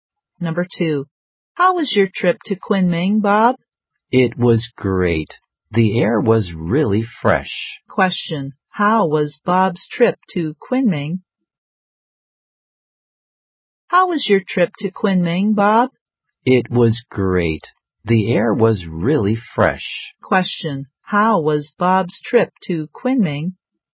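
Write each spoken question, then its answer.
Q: how was Bob's trip to Kunming?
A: Great; the air was really fresh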